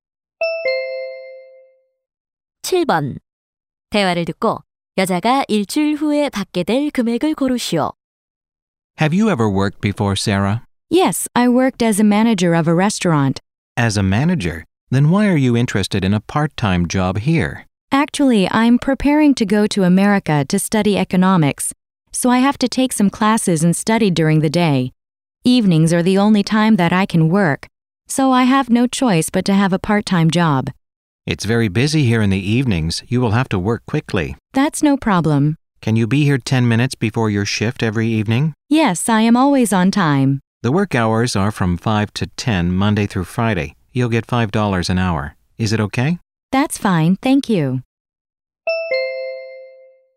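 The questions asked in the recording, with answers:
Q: 대화를 듣고 여자가 일주일 후에 받게 될 금액을 고르시오.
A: 125달러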